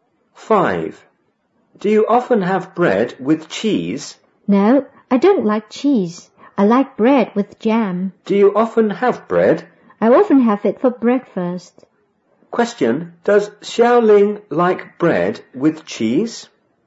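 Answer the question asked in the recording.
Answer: No, she doesn't.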